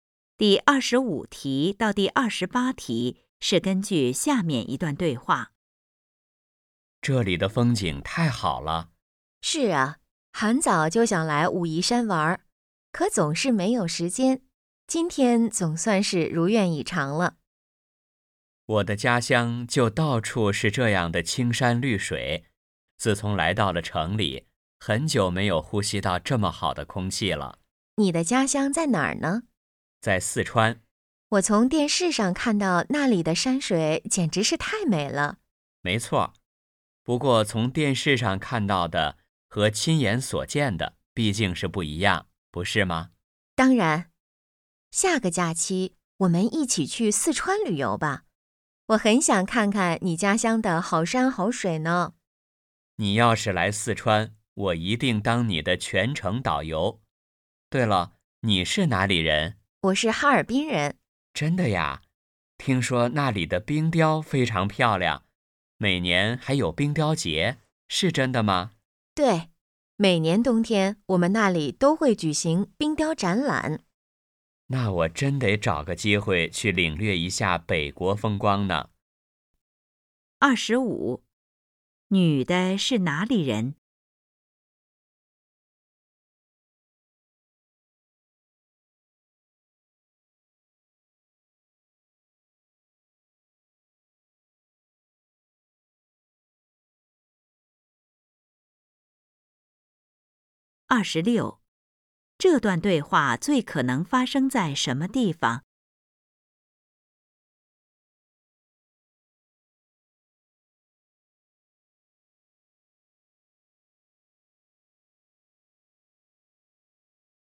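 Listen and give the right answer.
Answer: 武夷山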